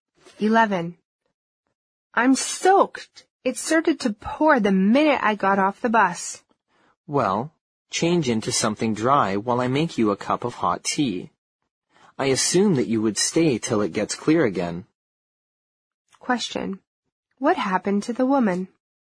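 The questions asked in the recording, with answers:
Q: What happened to the woman?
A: She got caught in a heavy rain after getting off the bus.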